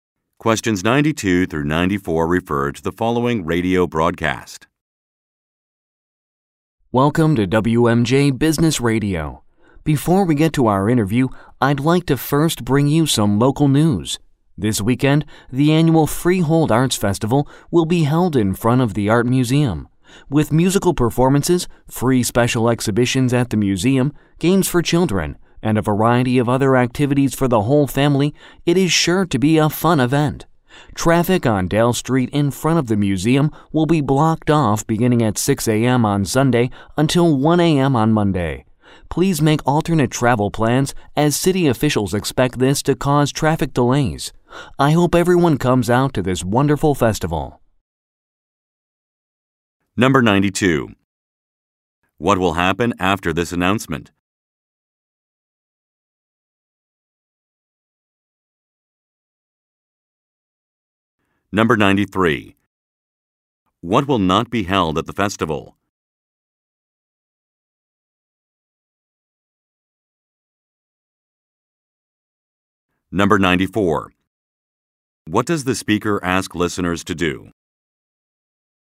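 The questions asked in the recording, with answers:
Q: What will happen after this announcement?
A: An interview will be held

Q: What does the speaker ask listeners to do?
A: Make alternate travel plans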